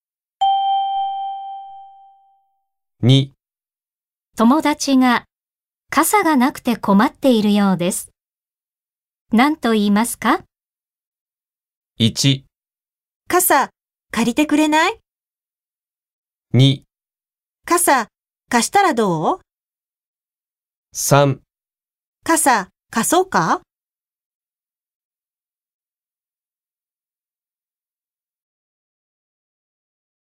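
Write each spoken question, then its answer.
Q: 友達が傘がなくて困っているようです。何と言いますか?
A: 3: 傘、貸そうか?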